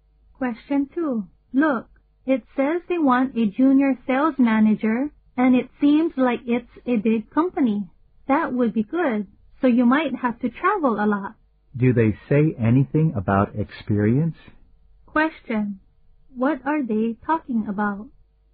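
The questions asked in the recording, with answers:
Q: What are they talking about?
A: A job advertisement for a junior sales manager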